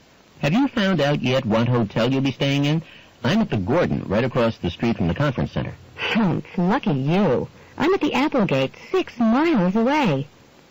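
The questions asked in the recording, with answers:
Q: What does the woman mean?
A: She is envious that the man's hotel is so close; hers is far away.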